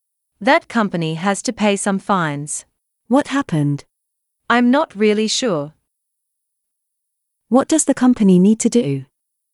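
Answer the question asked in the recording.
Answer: Pay some fines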